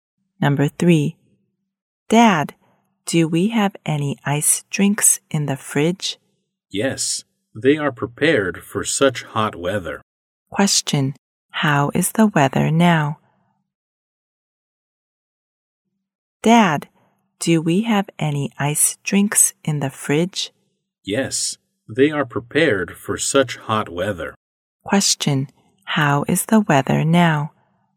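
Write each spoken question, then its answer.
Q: Question, how is the weather now?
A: Hot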